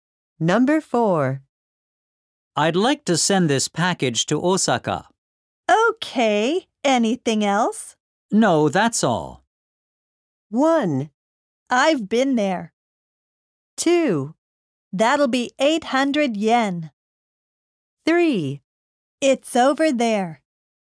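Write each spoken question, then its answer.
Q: No, that's all.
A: 2: That'll be 800 yen.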